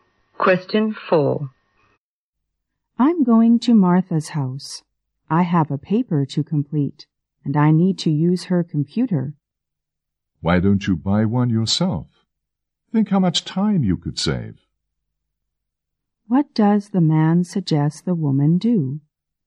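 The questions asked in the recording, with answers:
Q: What does the man suggest the woman do?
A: Buy a computer herself.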